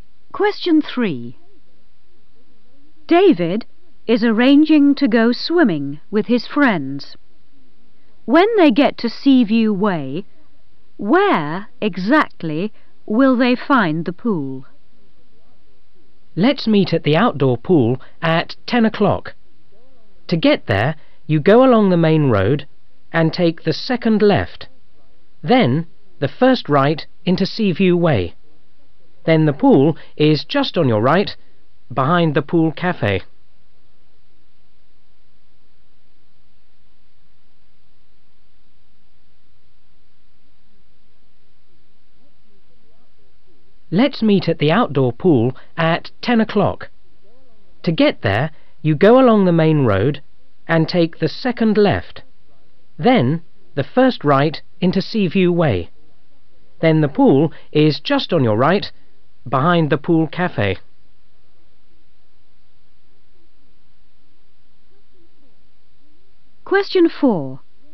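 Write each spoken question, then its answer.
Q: When they get to Seaview Way, where exactly will they find the pool?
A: on the right, behind the pool cafe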